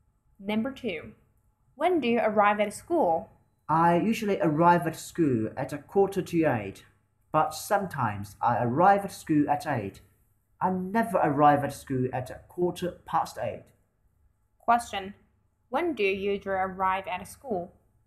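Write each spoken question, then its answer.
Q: When do you usually arrive at school?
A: At 7:45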